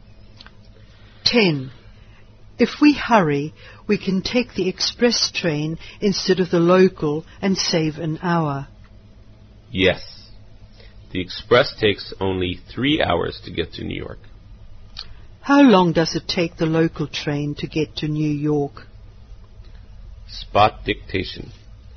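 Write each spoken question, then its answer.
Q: How long does it take the local train to get to New York?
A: Four hours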